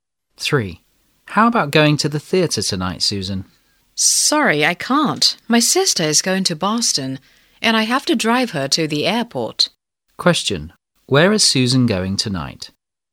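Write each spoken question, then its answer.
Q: Where is Susan going tonight?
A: To the airport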